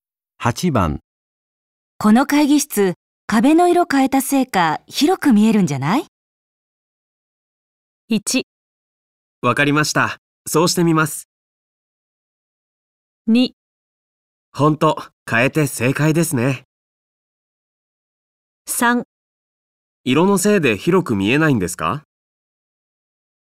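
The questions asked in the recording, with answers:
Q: この会議室、壁の色変えたせいか広く見えるんじゃない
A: 2: ほんと、変えて正解ですね。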